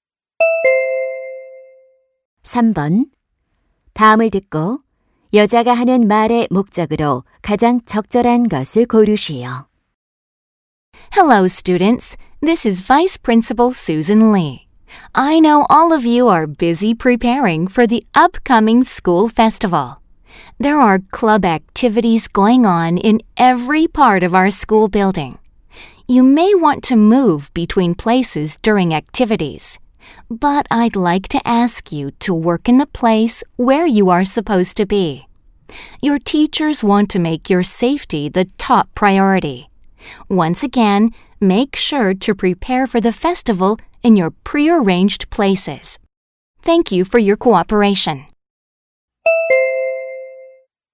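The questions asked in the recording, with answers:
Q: 다음을 듣고 여자가 하는 말의 목적으로 가장 적절한 것을 고르시오.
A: 축제 준비 중 정해진 장소에서 활동하도록 요청하려고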